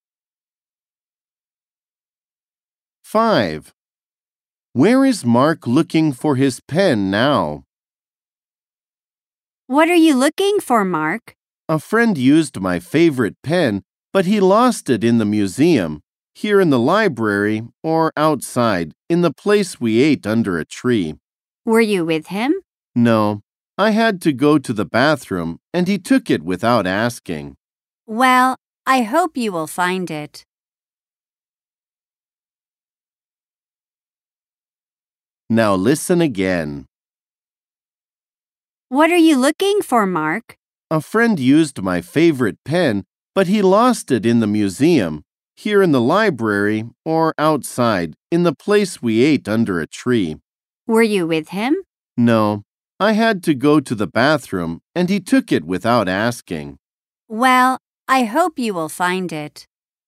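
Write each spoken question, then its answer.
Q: Where is Mark looking for his pen now?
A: In the library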